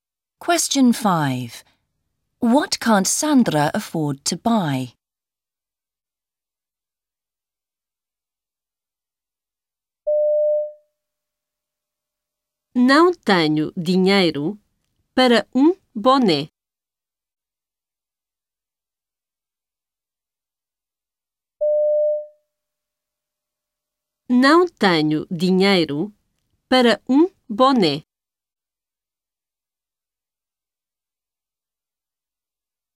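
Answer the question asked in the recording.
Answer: A cap (boné)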